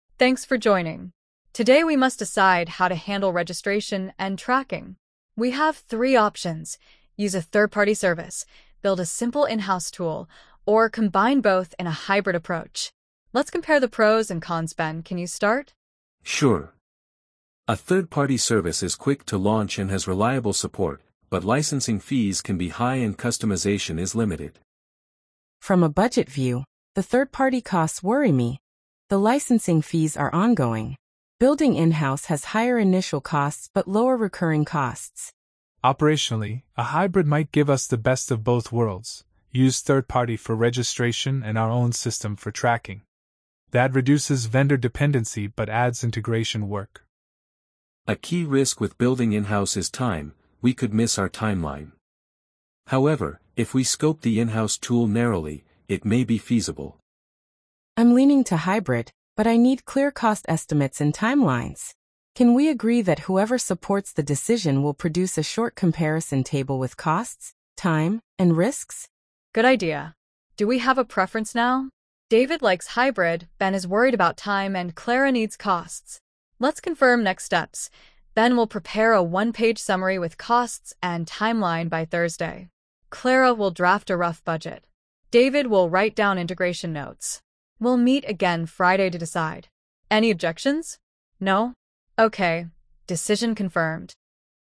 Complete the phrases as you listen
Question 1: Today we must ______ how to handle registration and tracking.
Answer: decide

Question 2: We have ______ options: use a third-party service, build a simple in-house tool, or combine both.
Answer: three

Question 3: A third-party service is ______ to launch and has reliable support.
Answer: quick

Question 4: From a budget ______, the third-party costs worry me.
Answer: view

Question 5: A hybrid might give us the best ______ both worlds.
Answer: of

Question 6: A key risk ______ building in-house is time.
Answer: with

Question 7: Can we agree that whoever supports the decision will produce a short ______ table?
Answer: comparison

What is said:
ANNA: Thanks for joining. Today we must decide how to handle registration and tracking. We have three options: use a third-party service, build a simple in-house tool, or combine both in a hybrid approach. Let's compare the pros and cons. Ben, can you start?
BEN: Sure. A third-party service is quick to launch and has reliable support, but licensing fees can be high and customization is limited.
CLARA: From a budget view, the third-party costs worry me the licensing fees are ongoing. Building in-house has higher initial costs but lower recurring costs.
DAVID: Operationally, a hybrid might give us the best of both worlds: use third-party for registration and our own system for tracking. That reduces vendor dependency but adds integration work.
BEN: A key risk with building in-house is time, we could miss our timeline. However, if we scope the in-house tool narrowly, it may be feasible.
CLARA: I'm leaning to hybrid, but I need clear cost estimates and timelines. Can we agree that whoever supports the decision will produce a short comparison table with costs, time, and risks?
ANNA: Good idea. Do we have a preference now? David seems to prefer hybrid, Ben worries about time, and Clara needs costs. Let's confirm: Ben will prepare a one-page comparison with estimated costs and timeline by Thursday; Clara will draft a provisional budget; David will draft integration notes. We'll reconvene Friday to confirm. Any objections? No? Decision confirmed.